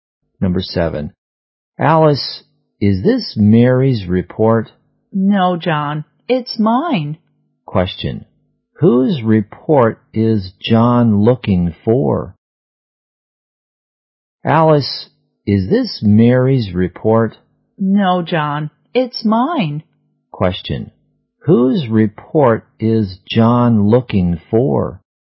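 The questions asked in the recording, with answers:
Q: Whose report is John looking for?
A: Mary's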